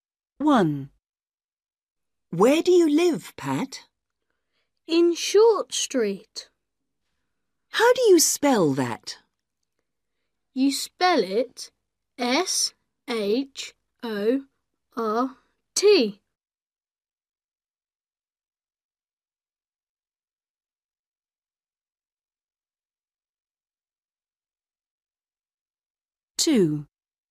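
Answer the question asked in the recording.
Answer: Short Street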